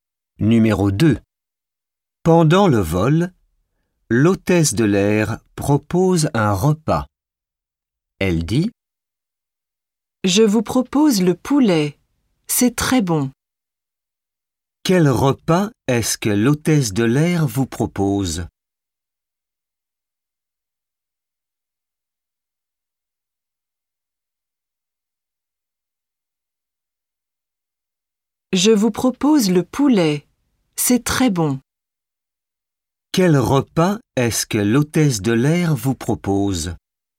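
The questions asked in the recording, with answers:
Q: Quel repas est-ce que l'hôtesse de l'air vous propose ?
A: Le poulet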